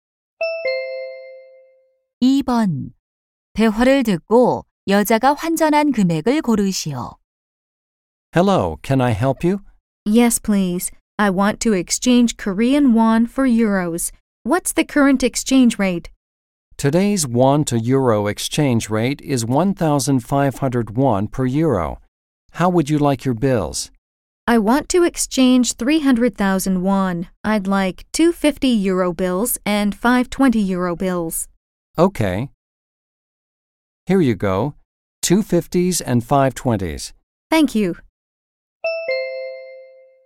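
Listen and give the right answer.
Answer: 30만 원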